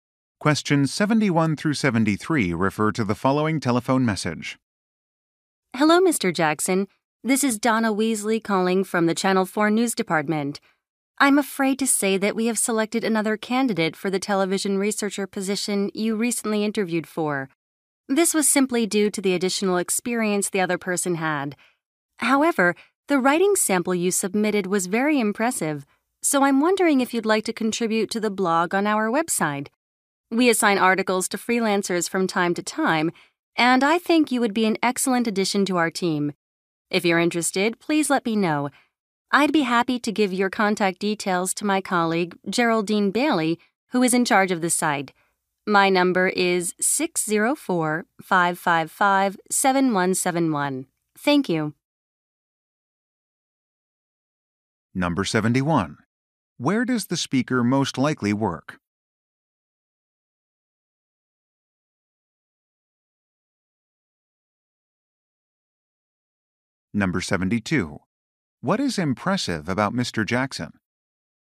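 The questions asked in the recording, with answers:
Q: Where does the speaker most likely work?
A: At a TV station (Channel 4 News Department)

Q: What is impressive about Mr. Jackson?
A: His writing sample

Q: What does the speaker offer to do?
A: Give his contact details to a colleague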